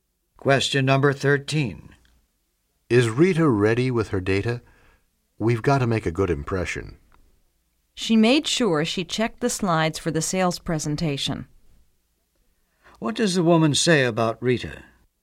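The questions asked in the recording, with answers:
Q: What does the woman say about Rita?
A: Rita is ready; she checked her slides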